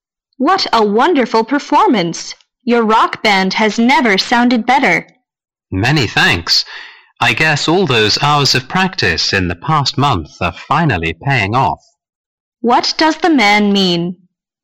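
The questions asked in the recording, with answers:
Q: What does the man mean?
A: His many hours of practice over the past month are paying off.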